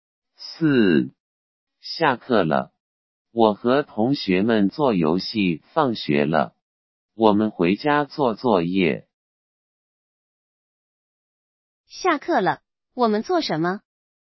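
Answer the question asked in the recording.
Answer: 做游戏。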